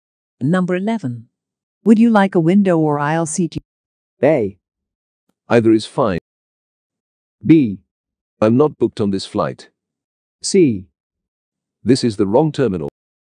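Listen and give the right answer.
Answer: A: Either is fine.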